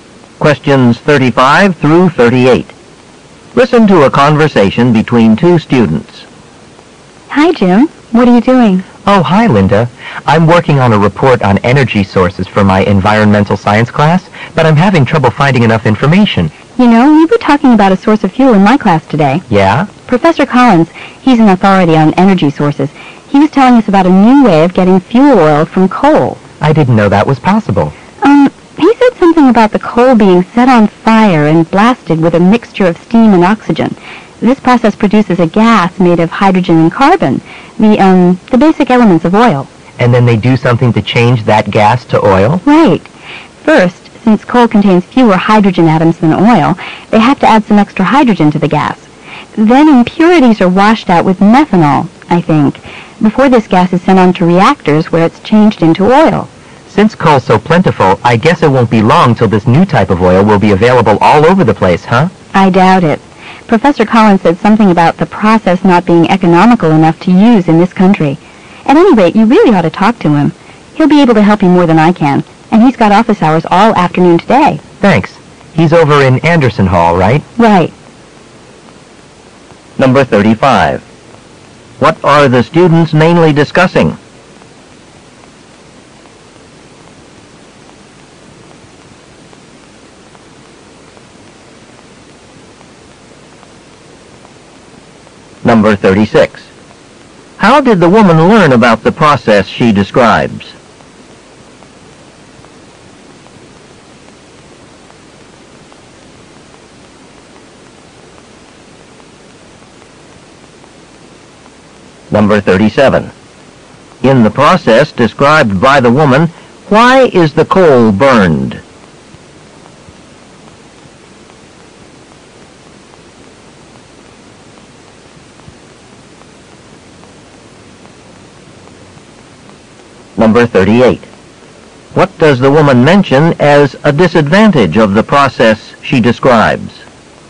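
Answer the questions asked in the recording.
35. A way to produce oil from coal
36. From Professor Collins in her class
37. To produce a gas of hydrogen and carbon
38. It isn't economical enough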